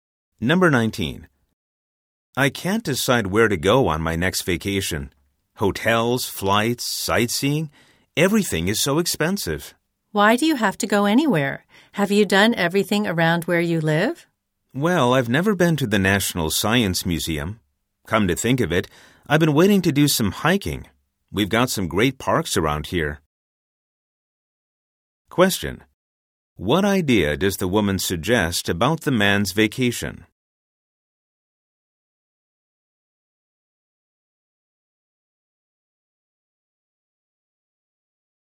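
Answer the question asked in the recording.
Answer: Spend it near home.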